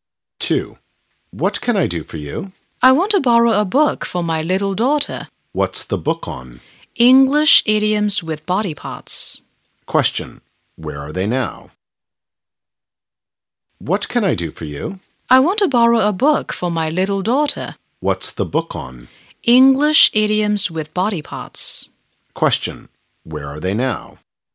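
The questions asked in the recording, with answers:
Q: Where are they now?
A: In a library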